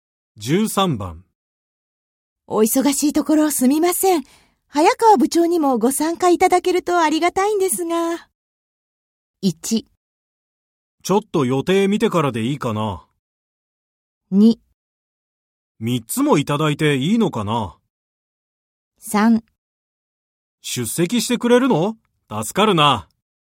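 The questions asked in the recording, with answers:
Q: お忙しいところすみません。早川部長にもご参加いただけるとありがたいんですが。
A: 1: ちょっと予定見てからでいいかな。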